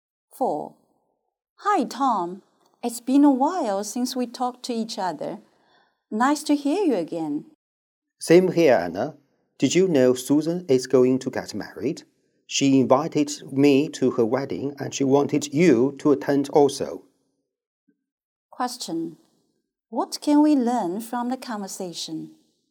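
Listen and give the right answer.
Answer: Susan is getting married and has invited both of them to her wedding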